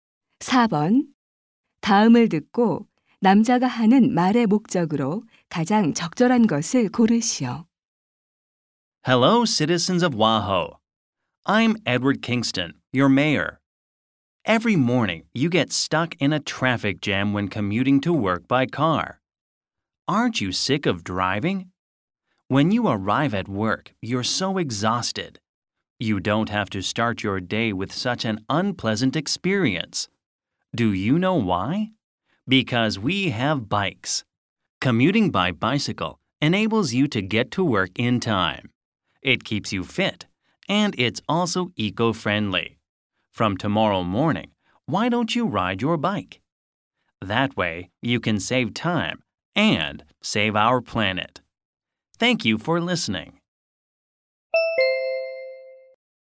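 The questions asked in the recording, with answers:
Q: 다음을 듣고 남자가 하는 말의 목적으로 가장 적절한 것을 고르시오.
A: 자전거 출퇴근을 권장하려고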